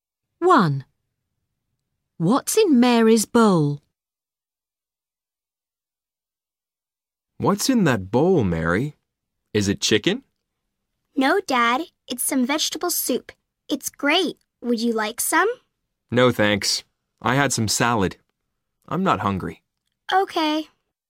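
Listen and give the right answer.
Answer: vegetable soup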